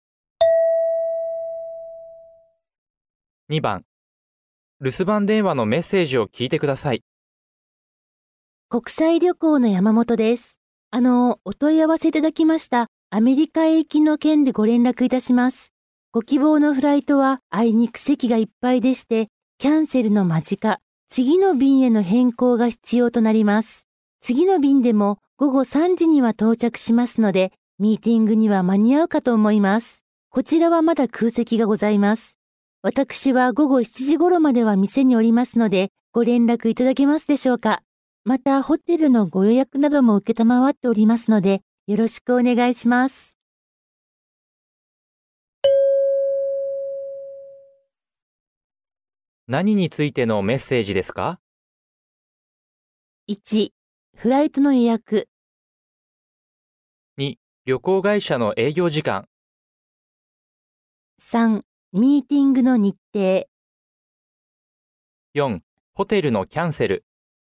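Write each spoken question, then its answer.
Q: 何についてのメッセージですか?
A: 1: フライトの予約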